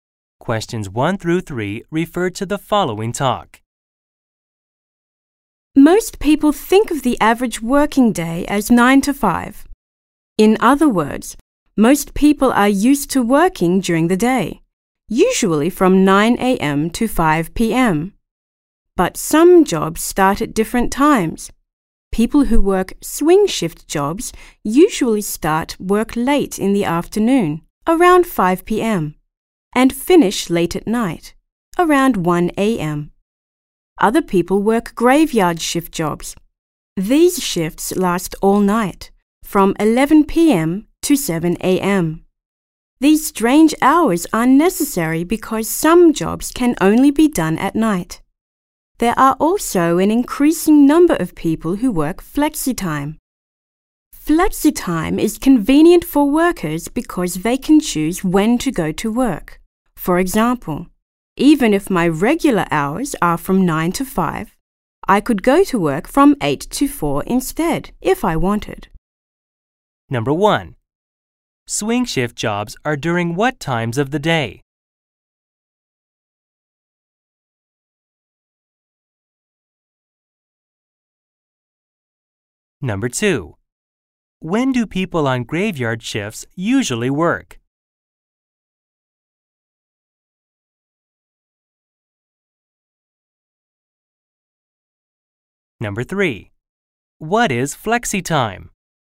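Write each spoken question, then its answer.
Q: Swing shift jobs are during what times of the day?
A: From about 5 p.m. to 1 a.m.

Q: When do people on graveyard shifts usually work?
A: All night, from 11 p.m. to 7 a.m.

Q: What is flexi time?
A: Workers can choose when to go to work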